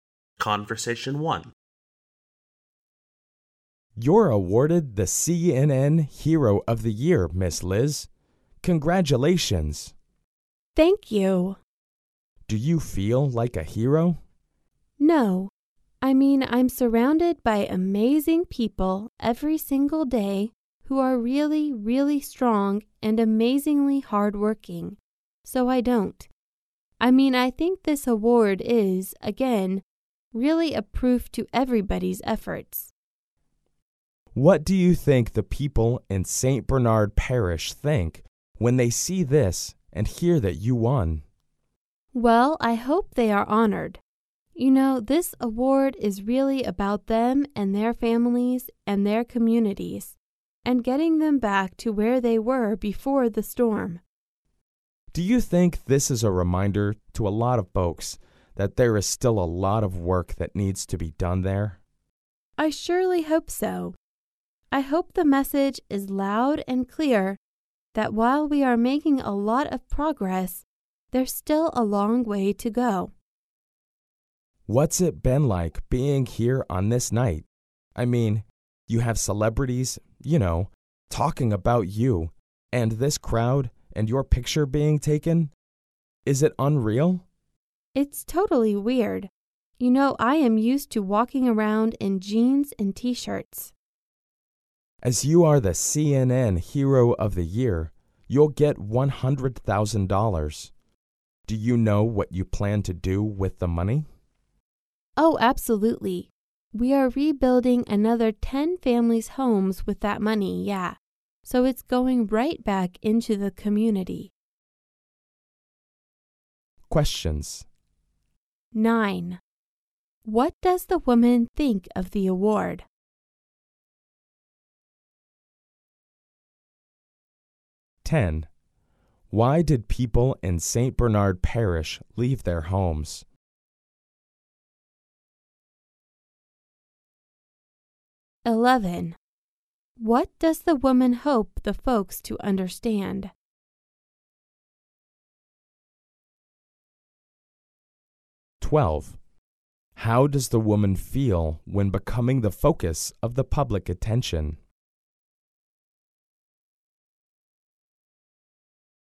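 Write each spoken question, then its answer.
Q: What does the woman think of the award?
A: It is a proof of everybody's efforts.

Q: Why did people in St. Bernard Parish leave their homes?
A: Because of the storm.

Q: What does the woman hope the folks to understand?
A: There is still a lot of work to be done.

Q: How does the woman feel when becoming the focus of the public attention?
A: She feels it is totally weird.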